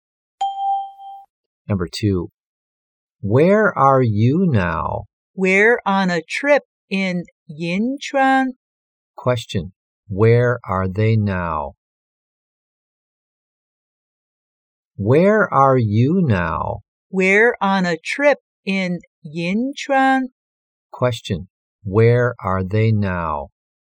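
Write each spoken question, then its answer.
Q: where are they now?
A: On a trip in Yinchuan.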